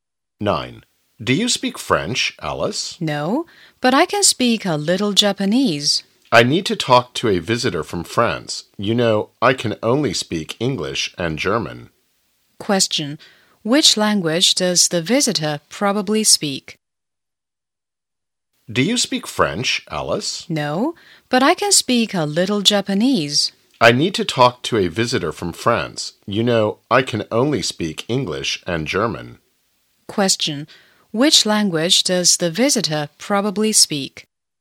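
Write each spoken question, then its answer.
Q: Which language does the visitor probably speak?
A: French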